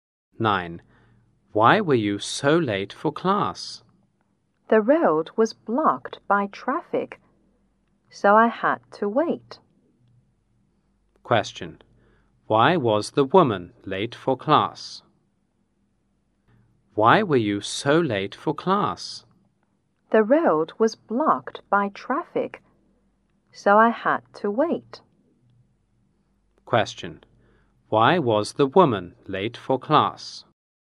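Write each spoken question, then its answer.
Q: Question. Why was the woman late for class?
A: The road was blocked by traffic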